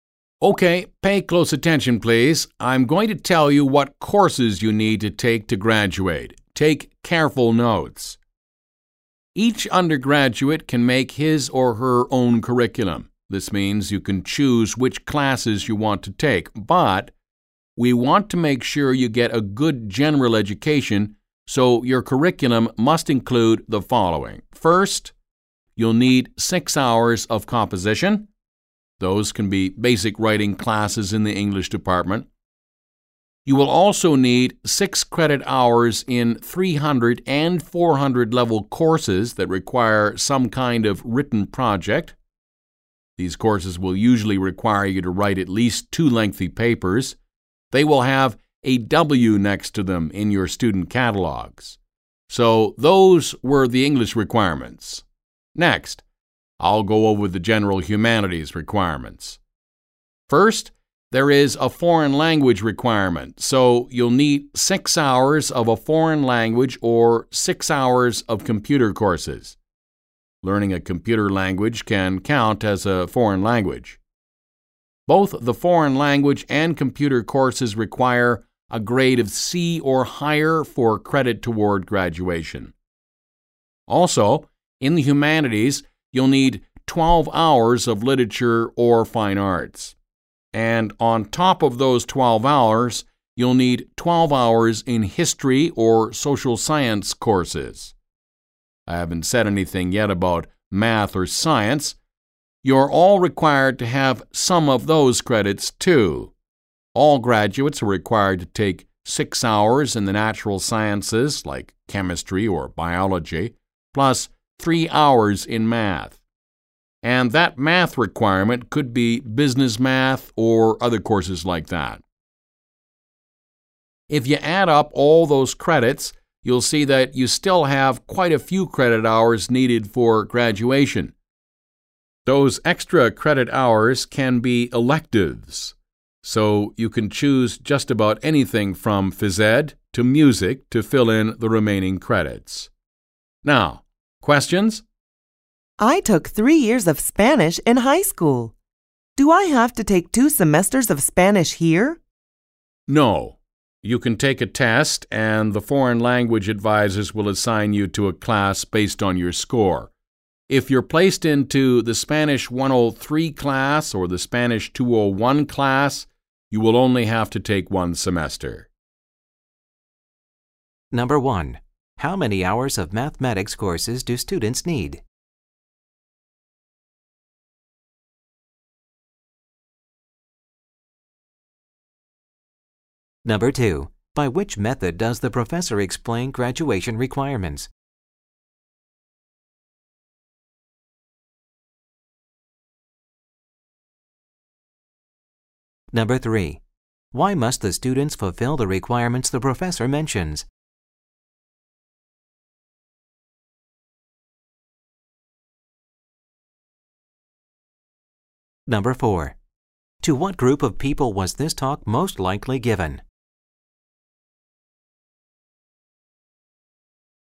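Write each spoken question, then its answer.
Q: How many hours of mathematics courses do students need?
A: 3 hours

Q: Why must the students fulfill the requirements the professor mentions?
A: To make sure they get a good general education

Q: To what group of people was this talk most likely given?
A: Undergraduate students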